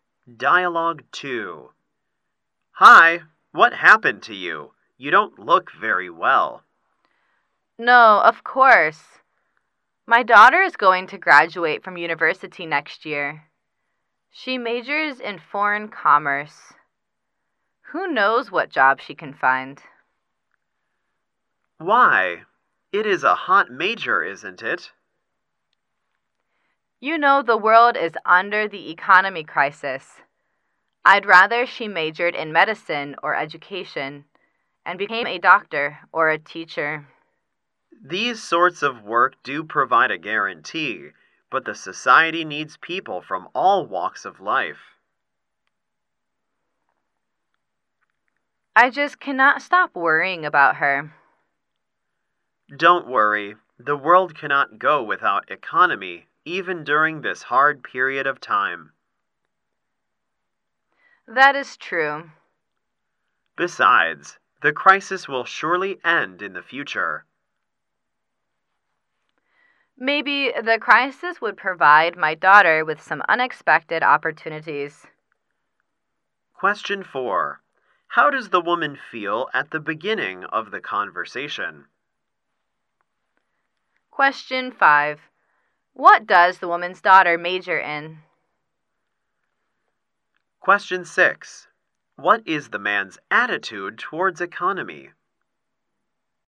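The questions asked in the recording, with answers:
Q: How does the woman feel at the beginning of the conversation?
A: Worried

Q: What does the woman's daughter major in?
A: Foreign commerce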